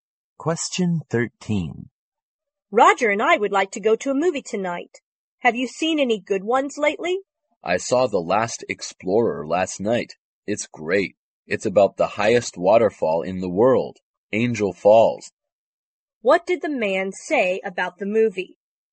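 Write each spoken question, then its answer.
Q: What did the man say about the movie?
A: It's great; it's about Angel Falls, the highest waterfall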